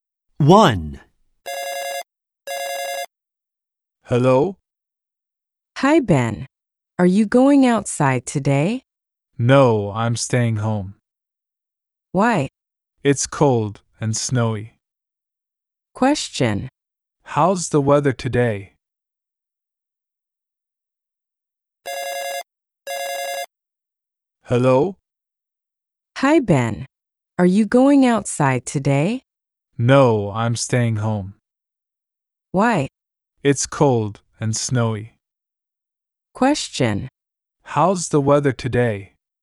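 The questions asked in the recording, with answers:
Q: How's the weather today?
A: It's cold and snowy.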